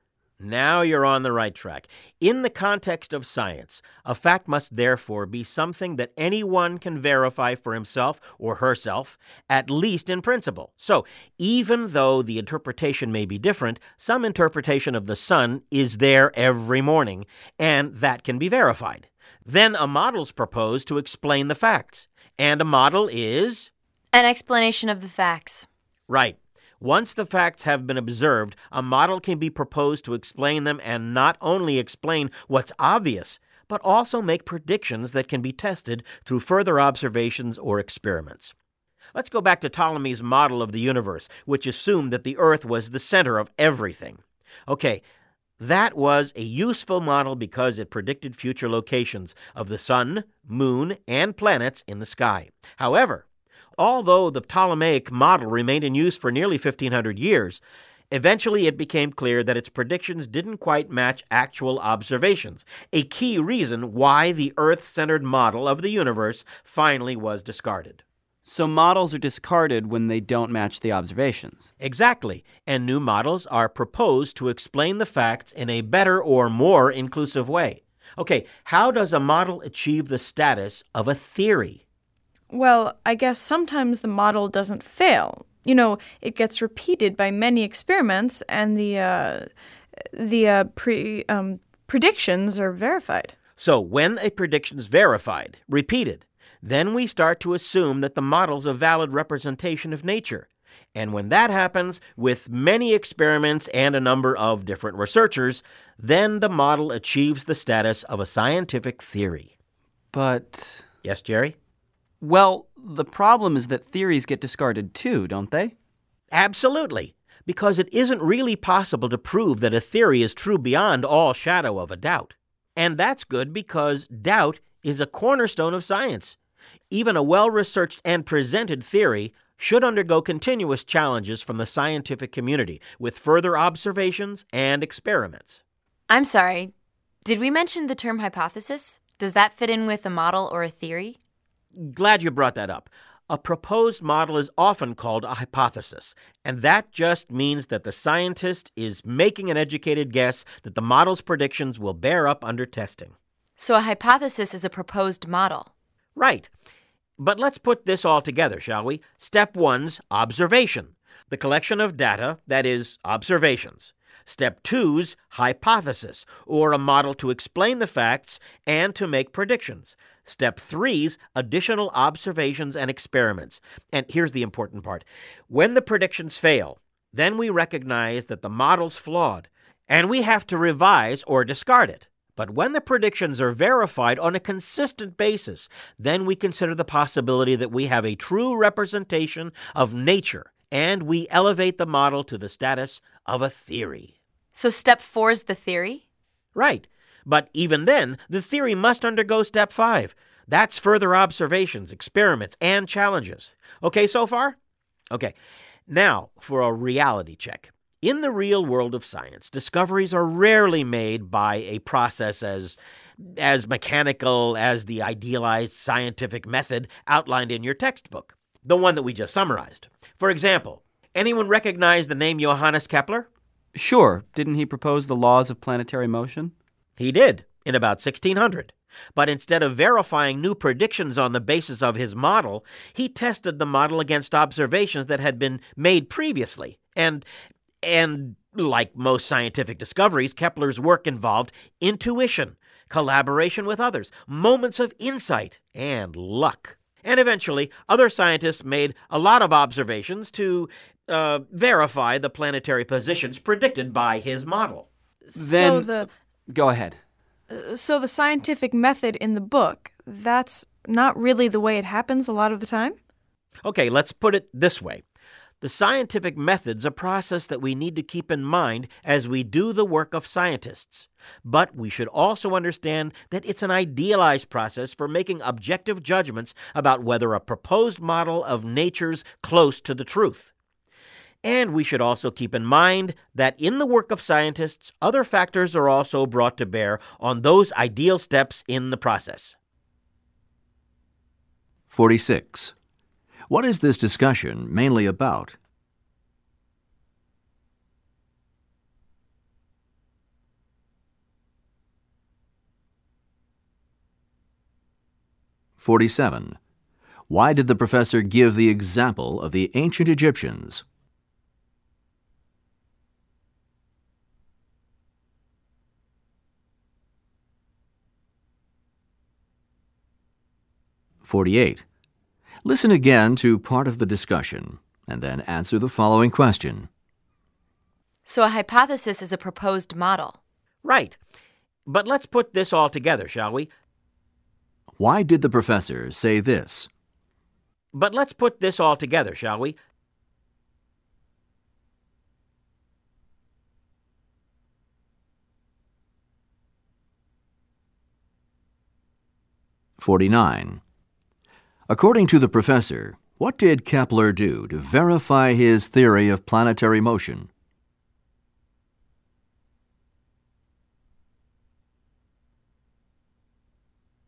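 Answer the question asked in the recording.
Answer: He tested his model against observations that had been made previously.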